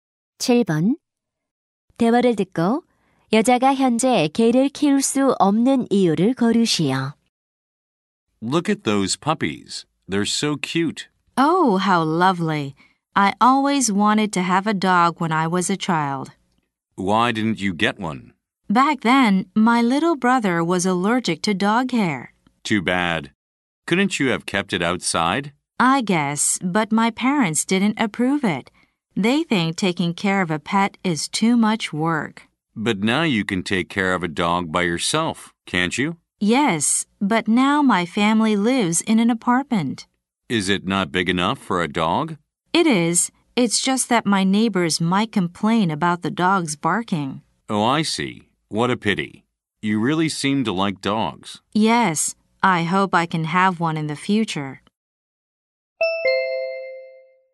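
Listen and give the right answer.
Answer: 이웃들이 개 짖는 소리에 불평할 수 있어서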